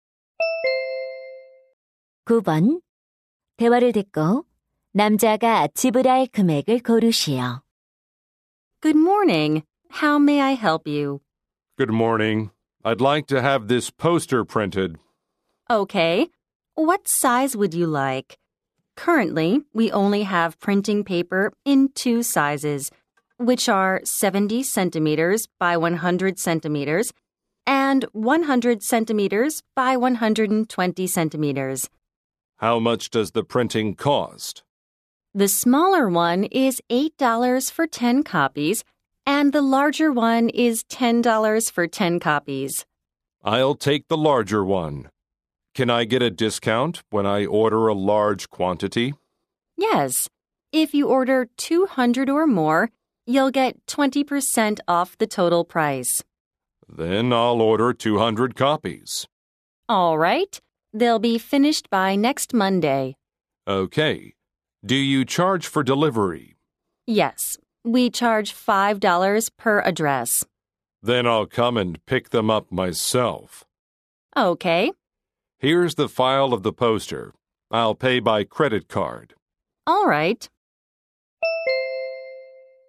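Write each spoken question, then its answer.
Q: 대화를 듣고 남자가 지불할 금액을 고르시오.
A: $160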